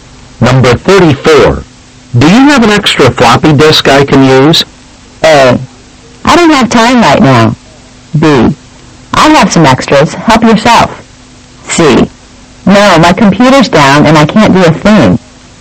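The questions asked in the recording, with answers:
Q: Do you have an extra floppy disk I can use?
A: B: I'll have some extras. Help yourself.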